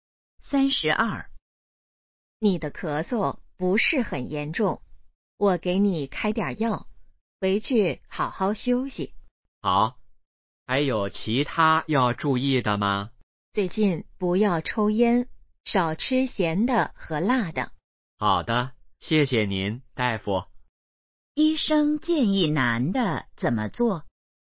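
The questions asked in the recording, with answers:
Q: 医生建议男的怎么做?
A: 不要抽烟,少吃咸的和辣的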